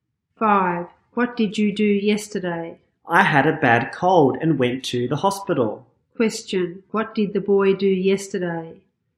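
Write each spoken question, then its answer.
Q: What did the boy do yesterday?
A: He went to the hospital because he had a bad cold.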